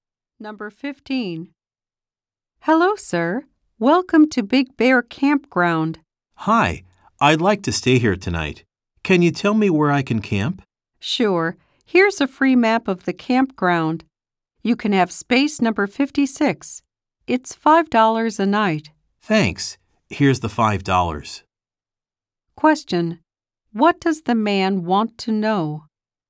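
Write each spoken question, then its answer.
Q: What does the man want to know?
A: Where he can camp.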